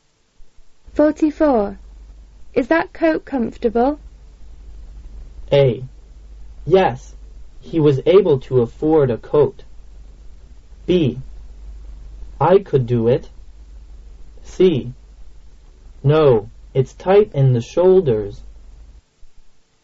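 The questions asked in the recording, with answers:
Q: Is that coat comfortable?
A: C: No, it's tight in the shoulders.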